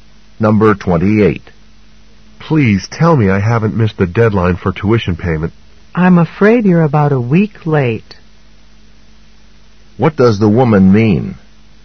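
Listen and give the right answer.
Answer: The man has missed the deadline by about a week.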